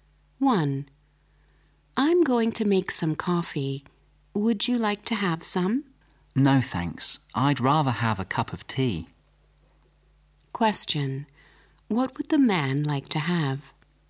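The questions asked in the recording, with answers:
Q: What would the man like to have?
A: A cup of tea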